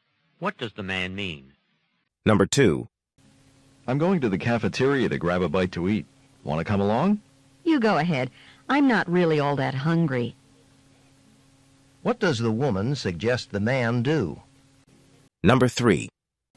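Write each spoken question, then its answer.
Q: What does the woman suggest the man do?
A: Go to the cafeteria without her.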